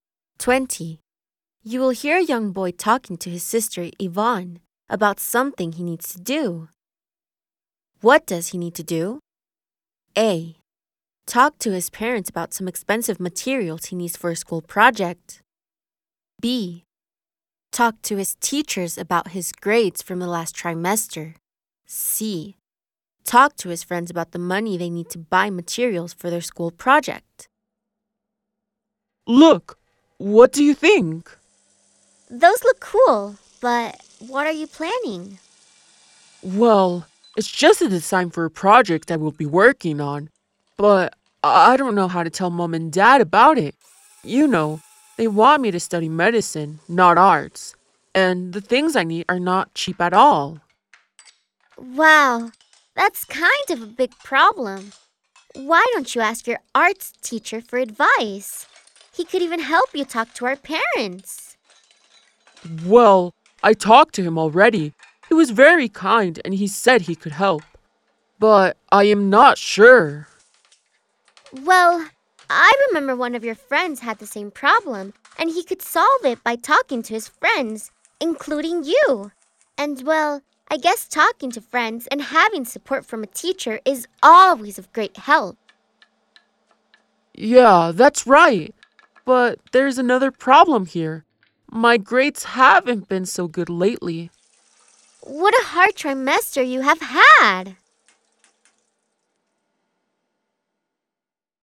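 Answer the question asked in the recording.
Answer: A: Talk to his parents about some expensive materials he needs for a school project.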